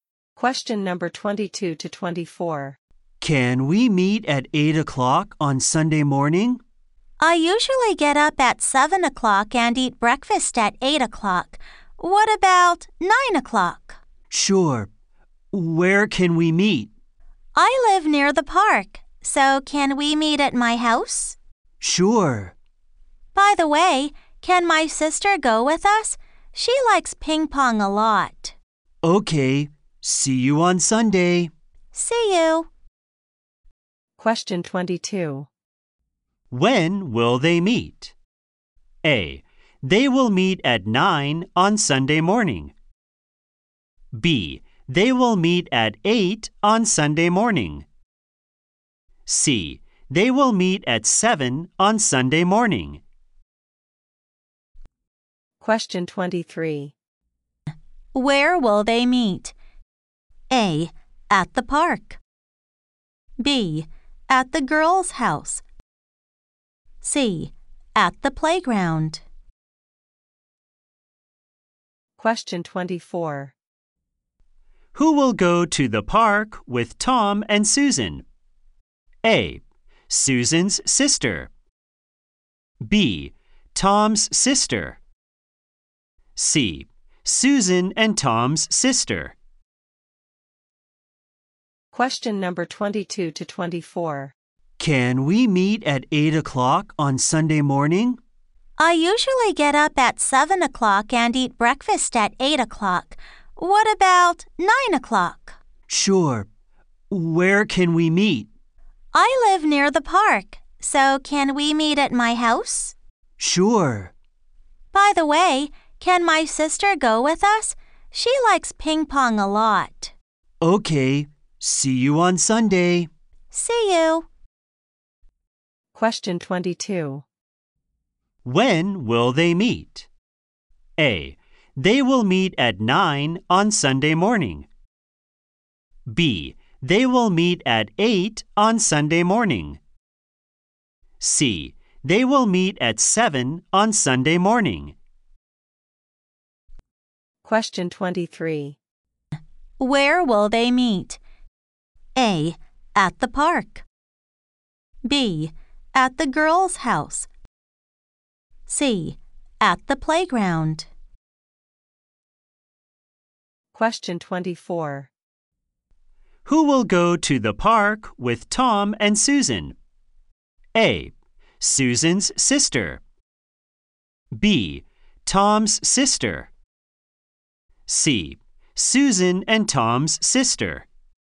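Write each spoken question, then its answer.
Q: When will they meet?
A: A: They will meet at 9 on Sunday morning.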